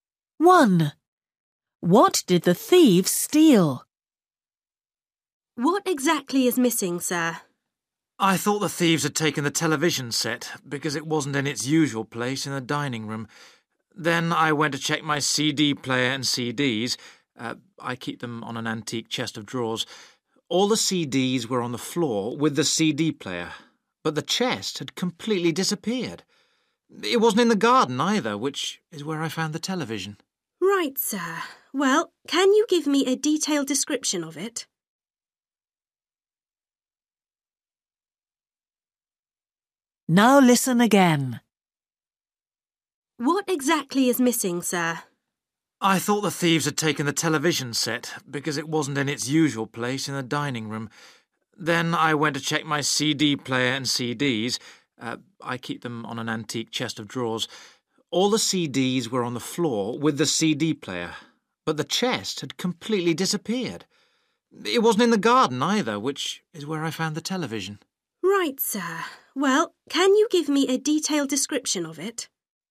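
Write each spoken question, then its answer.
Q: What did the thieves steal?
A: an antique chest of drawers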